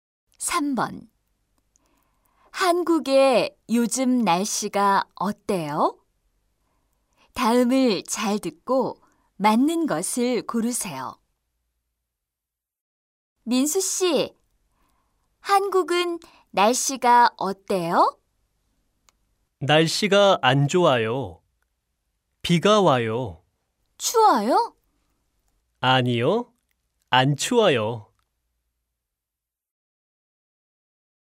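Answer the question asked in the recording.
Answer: 비가 와요. 안 추워요.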